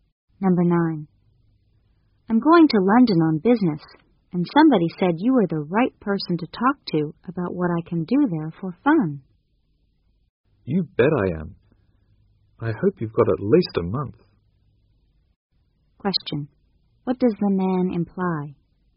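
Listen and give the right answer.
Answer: There are lots of fun things to do in London.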